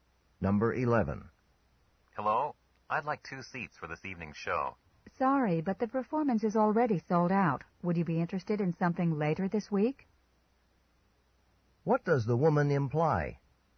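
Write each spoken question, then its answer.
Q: What does the woman imply?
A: Tickets are available for a later performance this week.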